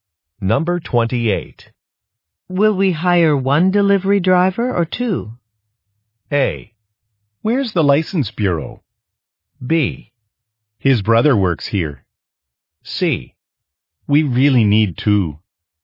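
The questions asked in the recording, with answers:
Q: Will we hire one delivery driver or two?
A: C: We really need two.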